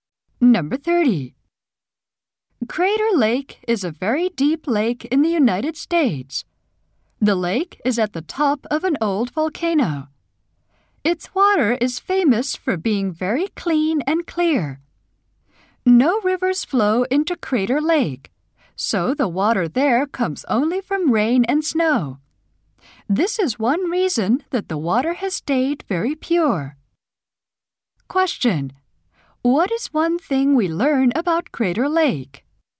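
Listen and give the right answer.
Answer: Its water comes only from rain and snow and is very pure.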